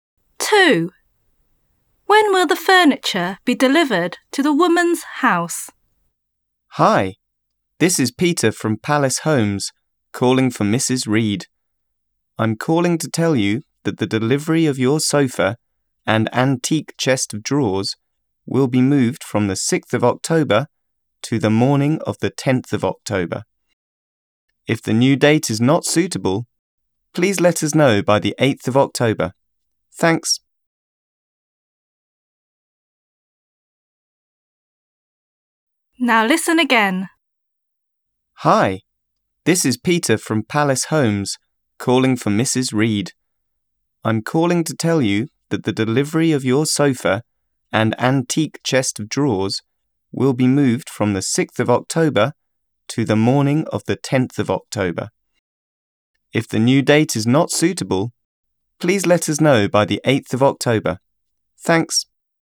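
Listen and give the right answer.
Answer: On the morning of the 10th of October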